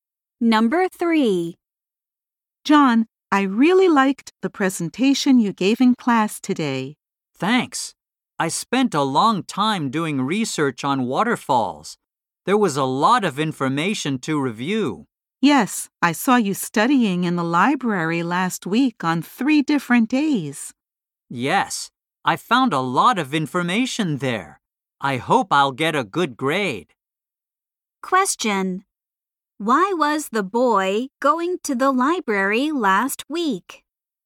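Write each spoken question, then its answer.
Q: Why was the boy going to the library last week?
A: To do research on waterfalls for his presentation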